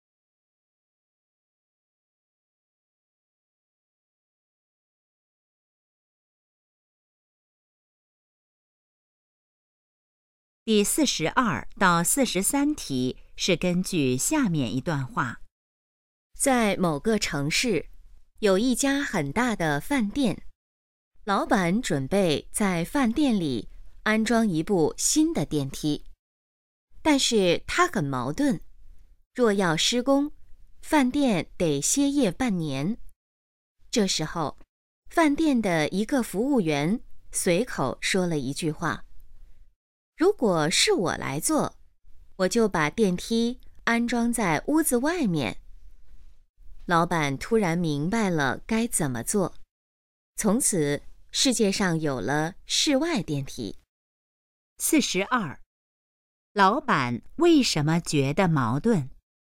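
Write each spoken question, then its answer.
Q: 老板为什么觉得矛盾?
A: 施工的话饭店得歇业半年

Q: 老板最后准备怎么做?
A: 把电梯安装在屋子外面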